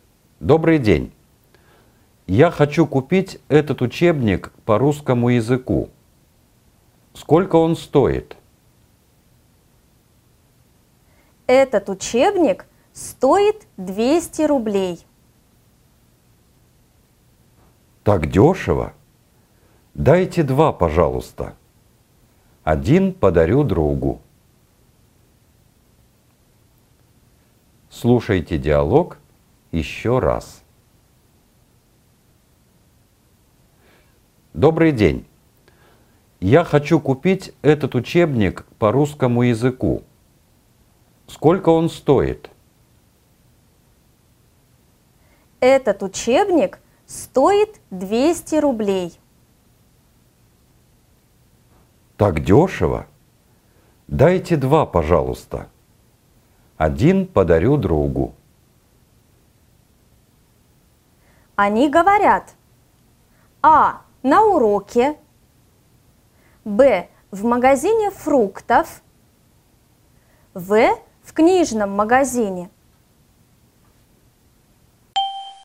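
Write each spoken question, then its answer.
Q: Они говорят: А. На уроке. Б. В магазине фруктов. В. В книжном магазине.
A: В: В книжном магазине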